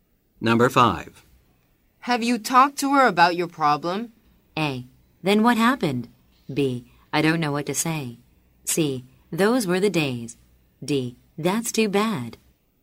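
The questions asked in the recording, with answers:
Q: Have you talked to her about your problem?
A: B: I don't know what to say.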